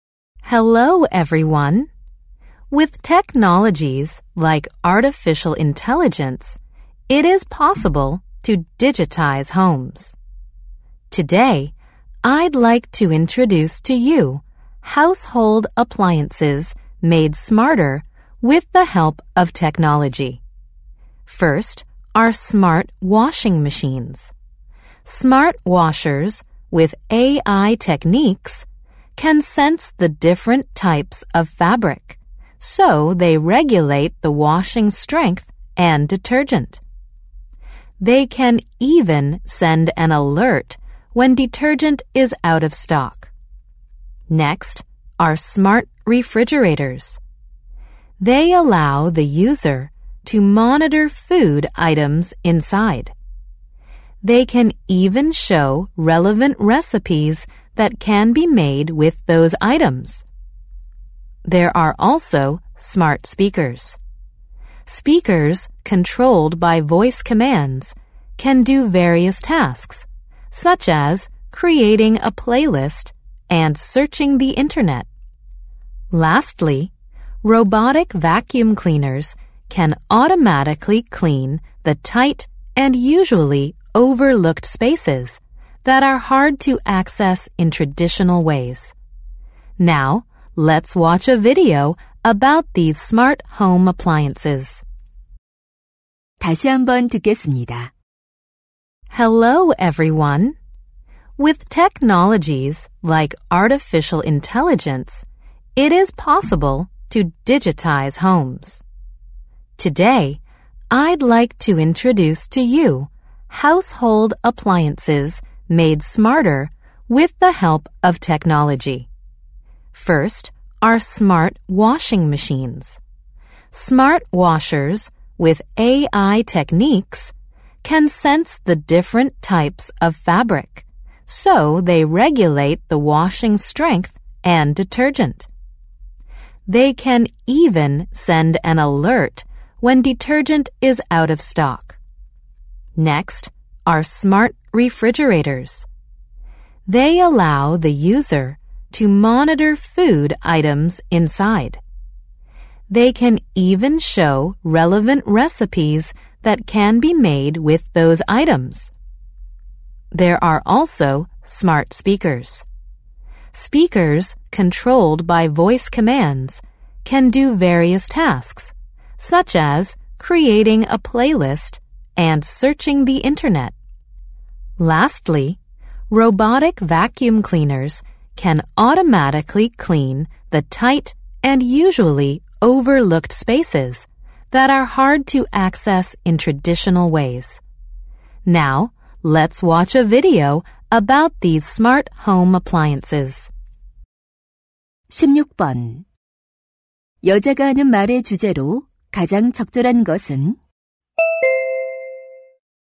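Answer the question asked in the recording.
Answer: 기술 덕분에 더 똑똑해진 가전제품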